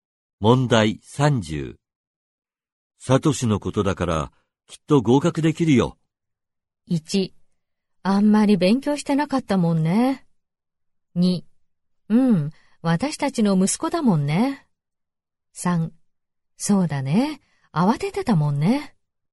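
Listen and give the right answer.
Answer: 2: うん、私たちの息子だもんね。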